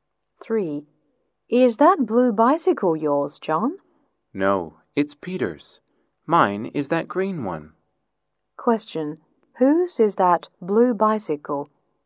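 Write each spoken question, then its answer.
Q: Whose is that blue bicycle?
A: Peter's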